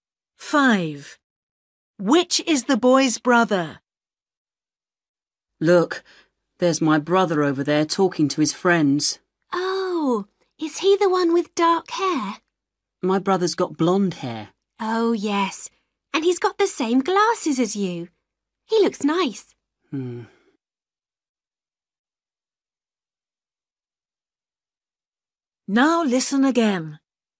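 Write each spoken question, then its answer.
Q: Which is the boy's brother?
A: the one with blonde hair and glasses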